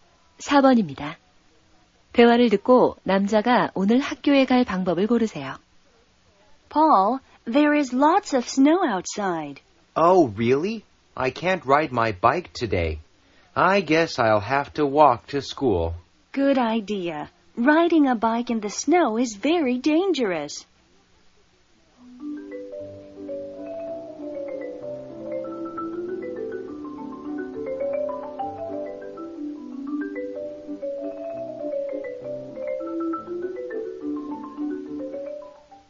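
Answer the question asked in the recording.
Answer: 걸어서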